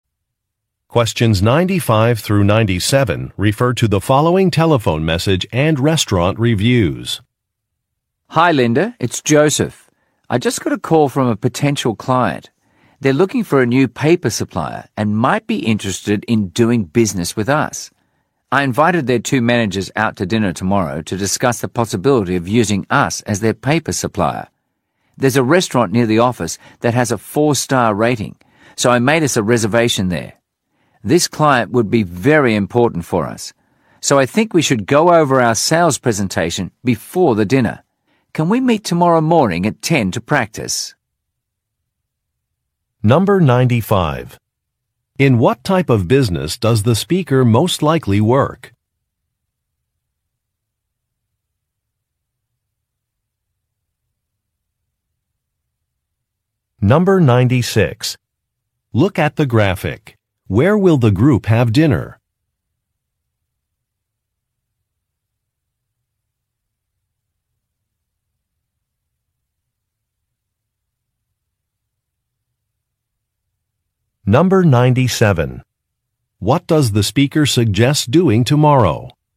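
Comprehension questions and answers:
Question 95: In what type of business does the speaker most likely work?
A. A magazine publisher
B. A paper supply company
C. A cleaning service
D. An accounting firm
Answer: B. A paper supply company

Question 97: What does the speaker suggest doing tomorrow?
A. Interviewing a prospective employee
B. Changing a menu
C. Revising an itinerary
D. Practicing a presentation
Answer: D. Practicing a presentation

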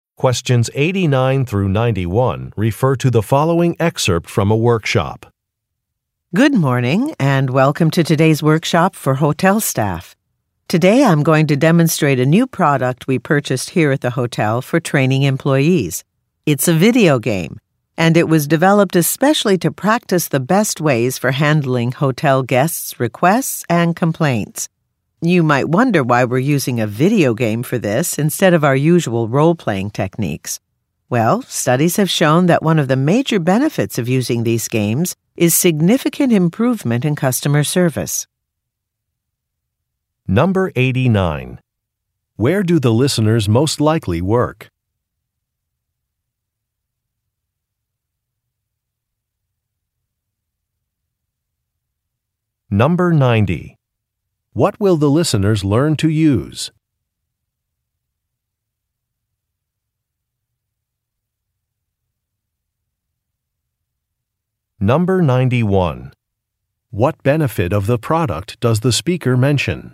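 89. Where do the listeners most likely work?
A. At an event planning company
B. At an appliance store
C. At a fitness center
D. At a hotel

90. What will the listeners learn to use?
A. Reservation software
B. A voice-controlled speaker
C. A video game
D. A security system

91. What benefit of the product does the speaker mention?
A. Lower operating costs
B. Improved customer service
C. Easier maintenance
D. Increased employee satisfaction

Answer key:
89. D. At a hotel
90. C. A video game
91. B. Improved customer service

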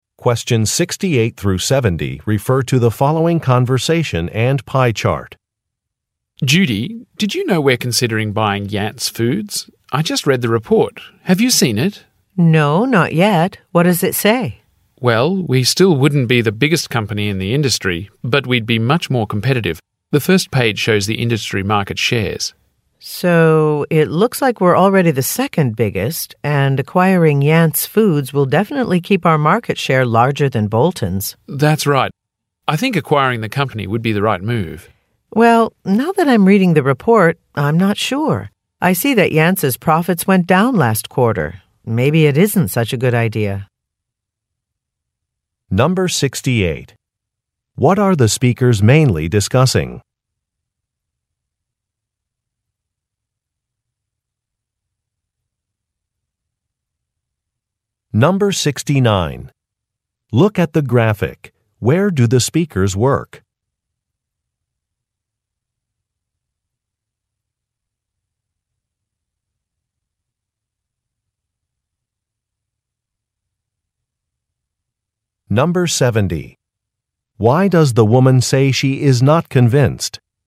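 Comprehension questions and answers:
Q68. What are the speakers mainly discussing?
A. A marketing campaign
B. A business acquisition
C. An annual budget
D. Employment figures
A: B. A business acquisition

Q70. Why does the woman say she is not convinced?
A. The man is not familiar with a business strategy.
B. Some figures are not accurate.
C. She does not want to hire new employees.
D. A company's profits have decreased.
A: D. A company's profits have decreased.

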